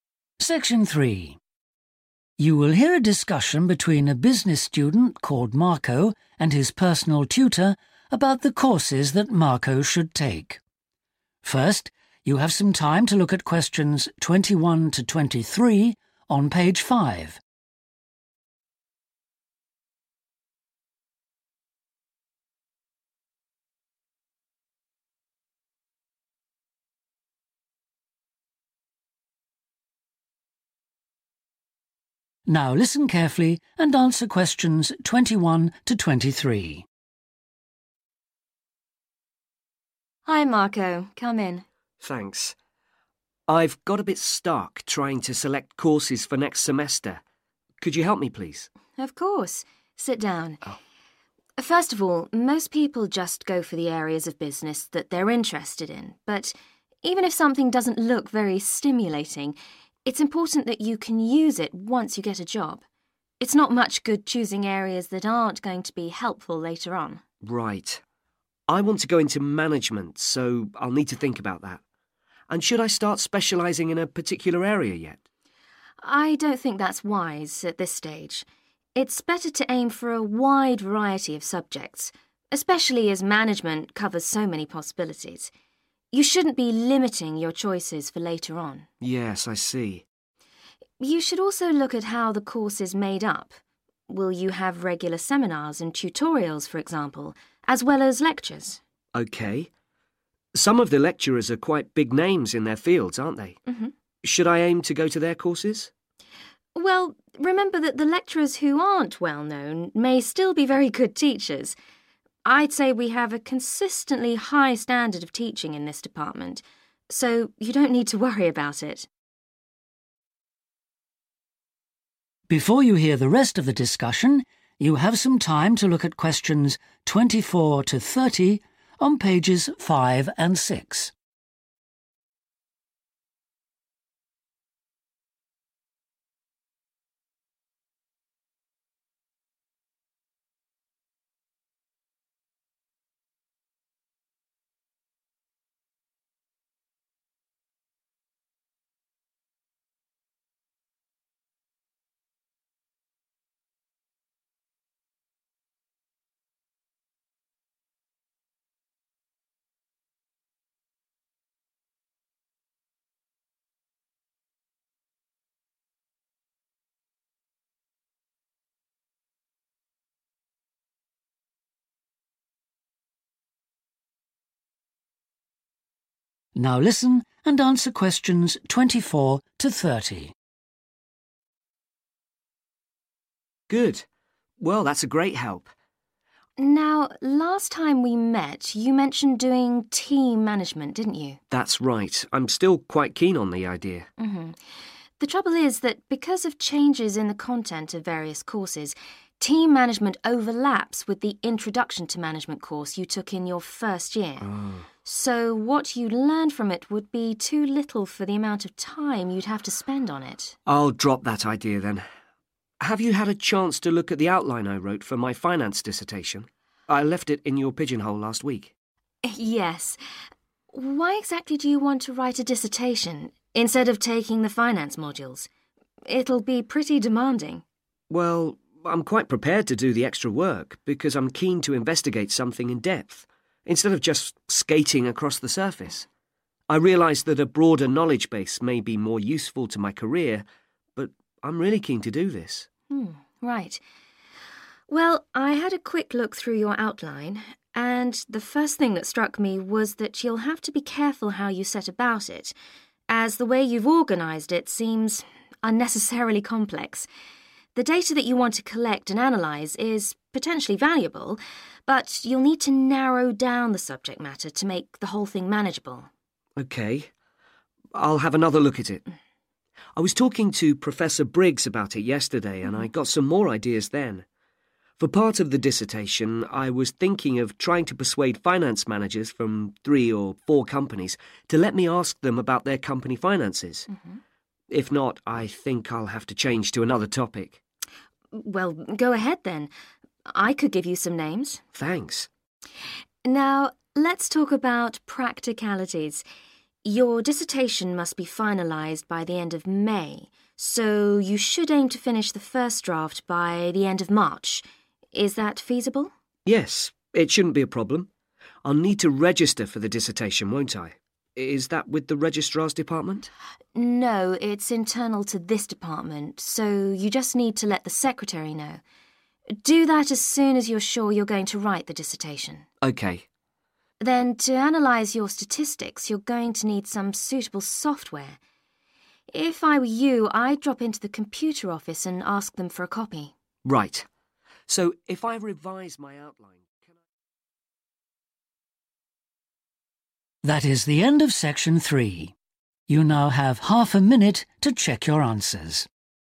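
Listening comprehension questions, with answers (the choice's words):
Choose THREE tetters, A-G.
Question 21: Which THREE factors does Marco's tutor advise him to consider when selecting a course?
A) possibility of specialisation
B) relevance to future career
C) personal interest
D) organisation of course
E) assessment methods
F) range of topics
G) reputation of lecturer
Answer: relevance to future career

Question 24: Why does Marco's tutor advise him to avoid the Team Management course?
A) It will repeat work that Marco has already done.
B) It is intended for students at a lower level than Marco.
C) It may take too much time to do well.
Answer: It will repeat work that Marco has already done.

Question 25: Why does Marco want to do a dissertation?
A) He thinks it will help his future career.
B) He would like to do a detailed study.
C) He has already done some work for it.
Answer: He would like to do a detailed study.

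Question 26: What does Marco's tutor think about the dissertation outline?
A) The topic is too narrow to be useful.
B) The available data may be unsuitable.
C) The research plan is too complicated.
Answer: The research plan is too complicated.

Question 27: What does Marco decide to do about his dissertation?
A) contact potential interviewees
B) change to another topic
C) discuss it with Professor Briggs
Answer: contact potential interviewees

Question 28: A first draft of the dissertation should be completed by the end of ...............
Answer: March

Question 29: The dissertation should be registered with the....................of the department.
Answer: secretary

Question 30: Marco should get a copy of the statistics software from the................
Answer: computer office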